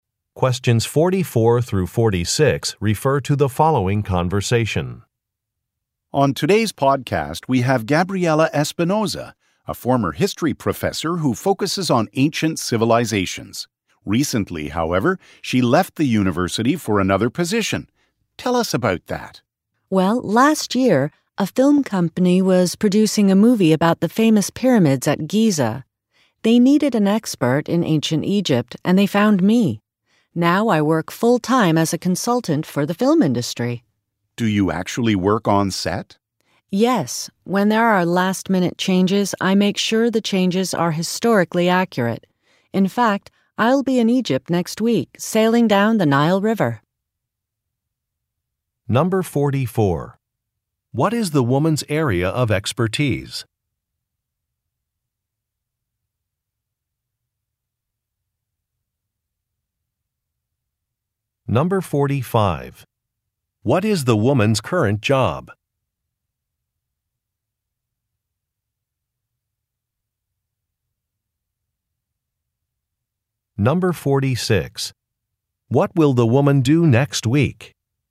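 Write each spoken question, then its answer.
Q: What is the woman's area of expertise?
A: Ancient civilizations (ancient history/Egypt)

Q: What is the woman's current job?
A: Film industry consultant

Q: What will the woman do next week?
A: Sail down the Nile River in Egypt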